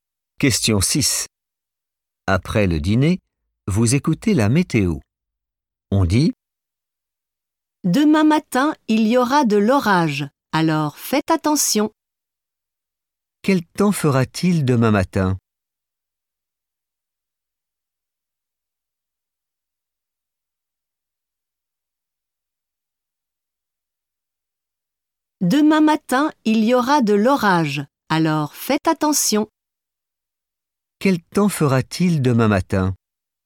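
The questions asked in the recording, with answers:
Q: Quel temps fera-t-il demain matin?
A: de l'orage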